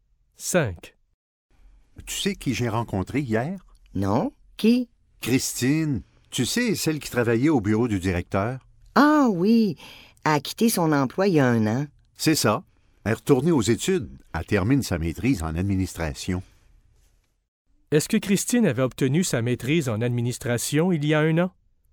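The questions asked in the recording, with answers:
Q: Est-ce que Christine avait obtenu sa maîtrise en administration il y a un an?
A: Non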